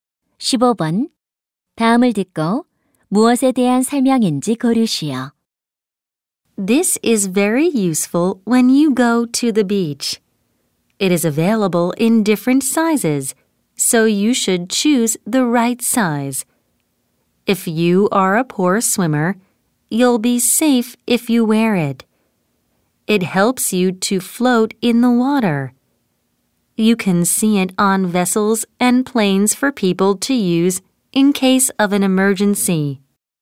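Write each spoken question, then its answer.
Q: 다음을 듣고 무엇에 대한 설명인지 고르시오.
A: 구명조끼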